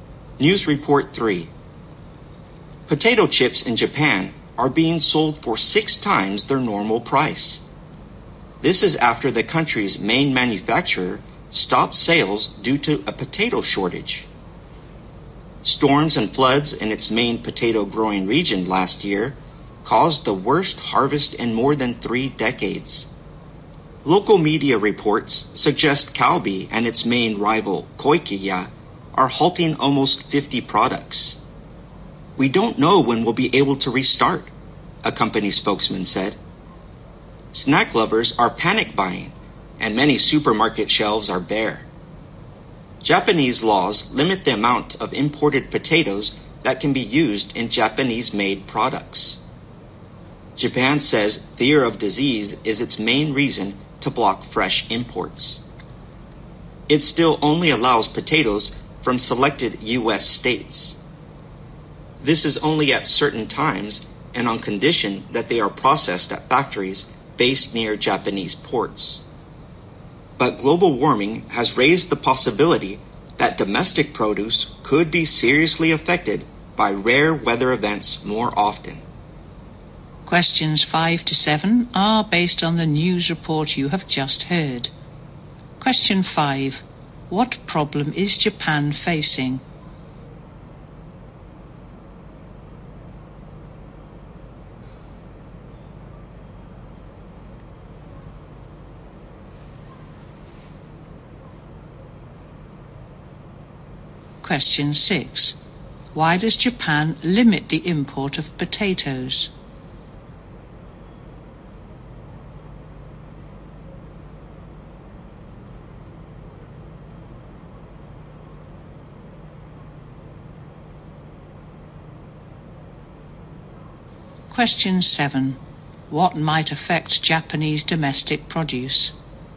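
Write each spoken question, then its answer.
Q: What problem is Japan facing?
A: A potato shortage

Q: Why does Japan limit the import of potatoes?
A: Fear of disease

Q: What might affect Japanese domestic produce?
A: Rare weather events caused by global warming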